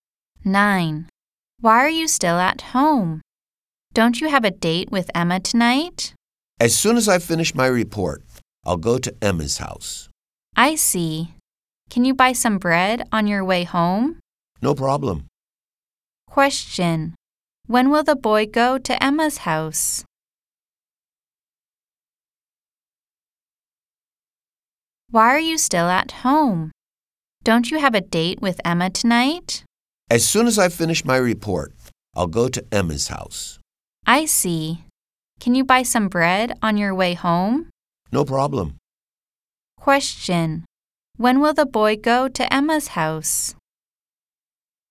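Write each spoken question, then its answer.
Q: When will the boy go to Emma's house?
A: As soon as he finishes his report.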